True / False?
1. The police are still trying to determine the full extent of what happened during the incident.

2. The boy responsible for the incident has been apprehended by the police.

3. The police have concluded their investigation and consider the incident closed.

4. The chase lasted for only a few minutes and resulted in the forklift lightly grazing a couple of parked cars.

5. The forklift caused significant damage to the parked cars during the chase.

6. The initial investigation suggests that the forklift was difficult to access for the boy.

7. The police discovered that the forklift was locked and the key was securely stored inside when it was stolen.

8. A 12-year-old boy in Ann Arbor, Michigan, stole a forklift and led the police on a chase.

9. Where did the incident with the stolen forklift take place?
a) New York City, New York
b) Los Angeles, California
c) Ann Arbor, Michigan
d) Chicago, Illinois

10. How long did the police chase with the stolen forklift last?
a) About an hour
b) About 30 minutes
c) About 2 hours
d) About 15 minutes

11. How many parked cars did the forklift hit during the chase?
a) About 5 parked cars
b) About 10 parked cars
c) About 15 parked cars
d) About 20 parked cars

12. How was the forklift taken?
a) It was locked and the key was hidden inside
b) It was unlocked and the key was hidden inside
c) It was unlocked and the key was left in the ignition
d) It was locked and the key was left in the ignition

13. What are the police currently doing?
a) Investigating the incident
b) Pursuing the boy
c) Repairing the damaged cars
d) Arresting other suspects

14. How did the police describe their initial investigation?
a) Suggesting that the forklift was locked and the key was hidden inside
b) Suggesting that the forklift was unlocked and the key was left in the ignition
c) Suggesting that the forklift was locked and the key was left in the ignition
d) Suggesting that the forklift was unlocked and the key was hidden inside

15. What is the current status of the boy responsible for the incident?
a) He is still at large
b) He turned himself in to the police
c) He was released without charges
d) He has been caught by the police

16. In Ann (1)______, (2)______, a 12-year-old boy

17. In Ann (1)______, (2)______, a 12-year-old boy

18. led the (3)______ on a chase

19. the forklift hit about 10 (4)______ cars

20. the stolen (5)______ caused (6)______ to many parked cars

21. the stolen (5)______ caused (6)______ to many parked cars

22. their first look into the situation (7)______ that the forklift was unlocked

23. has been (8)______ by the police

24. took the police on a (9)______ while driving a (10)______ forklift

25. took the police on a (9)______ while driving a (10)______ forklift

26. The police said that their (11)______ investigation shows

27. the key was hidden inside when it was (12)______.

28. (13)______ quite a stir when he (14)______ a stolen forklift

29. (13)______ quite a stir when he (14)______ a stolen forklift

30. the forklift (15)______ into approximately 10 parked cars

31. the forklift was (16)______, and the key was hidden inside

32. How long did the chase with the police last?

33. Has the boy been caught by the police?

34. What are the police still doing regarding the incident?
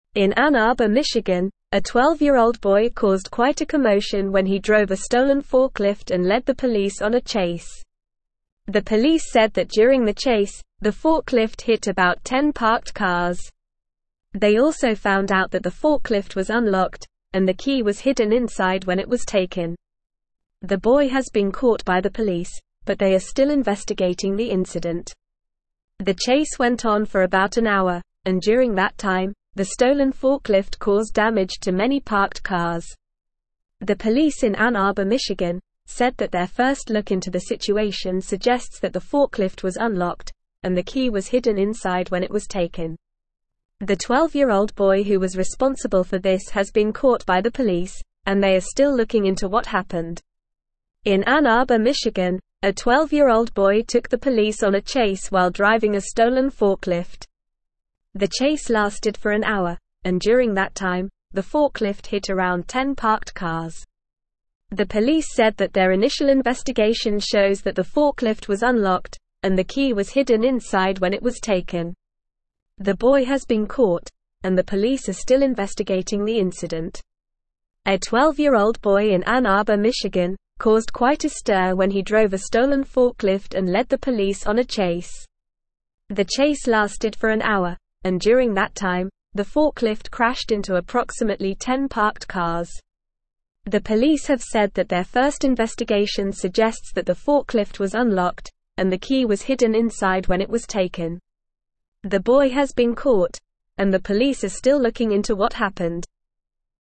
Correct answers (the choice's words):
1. True
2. True
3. False
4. False
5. True
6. False
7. False
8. True
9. Ann Arbor, Michigan
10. About an hour
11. About 10 parked cars
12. It was unlocked and the key was hidden inside
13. Investigating the incident
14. Suggesting that the forklift was unlocked and the key was hidden inside
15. He has been caught by the police
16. Arbor
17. Michigan
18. police
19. parked
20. forklift
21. damage
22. suggests
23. caught
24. chase
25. stolen
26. initial
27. taken
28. caused
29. drove
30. crashed
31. unlocked
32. The chase with the police lasted for about an hour.
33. Yes, the boy has been caught by the police.
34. The police are still investigating the incident.

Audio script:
In Ann Arbor, Michigan, a 12-year-old boy caused quite a commotion when he drove a stolen forklift and led the police on a chase. The police said that during the chase, the forklift hit about 10 parked cars. They also found out that the forklift was unlocked, and the key was hidden inside when it was taken. The boy has been caught by the police, but they are still investigating the incident.
The chase went on for about an hour, and during that time, the stolen forklift caused damage to many parked cars. The 12-year-old boy who was responsible for this has been caught by the police, and they are still looking into what happened.
The chase lasted for an hour, and during that time, the forklift hit around 10 parked cars.
The chase lasted for an hour, and during that time, the forklift crashed into approximately 10 parked cars.

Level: Level 3